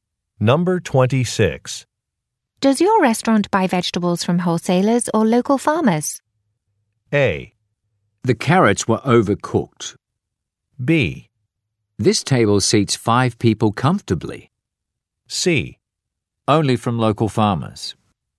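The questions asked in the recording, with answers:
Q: Does your restaurant buy vegetables from wholesalers or local farmers?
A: C: Only from local farmers.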